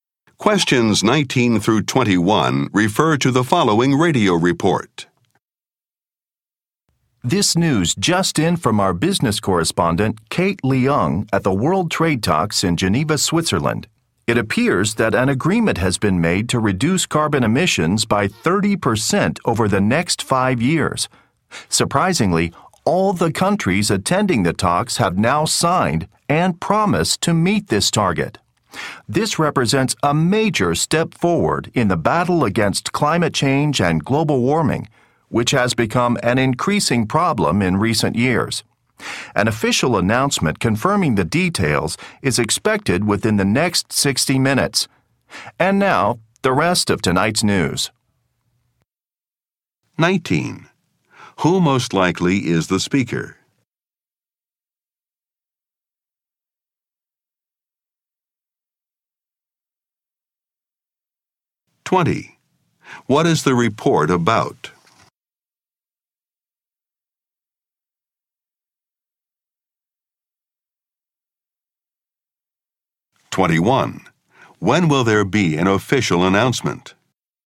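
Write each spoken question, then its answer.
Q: Who most likely is the speaker?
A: A news reporter

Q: What is the report about?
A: An agreement to reduce carbon emissions

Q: When will there be an official announcement?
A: Within the next hour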